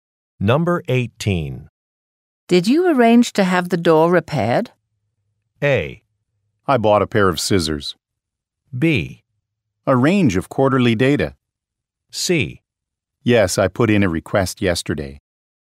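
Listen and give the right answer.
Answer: C: Yes, I put in a request yesterday.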